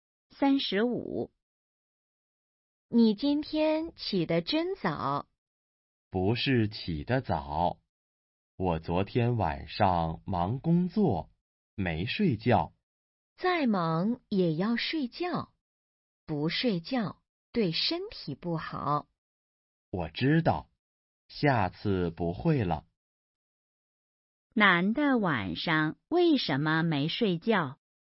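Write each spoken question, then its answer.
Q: 男的晚上为什么没睡觉?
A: 忙工作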